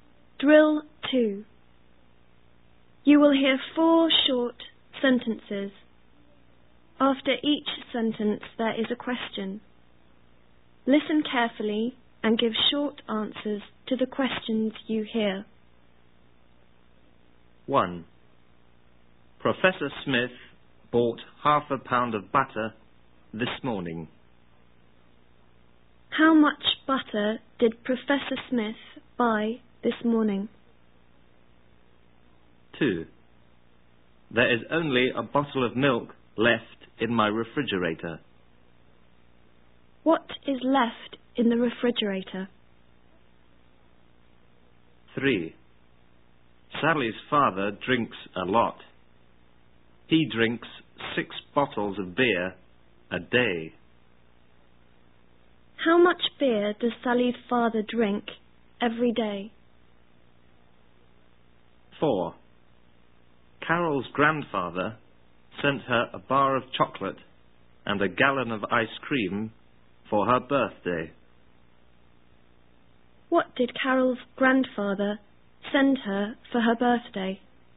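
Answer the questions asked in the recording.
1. Half a pound
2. Only a bottle of milk
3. Six bottles
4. A bar of chocolate and a gallon of ice cream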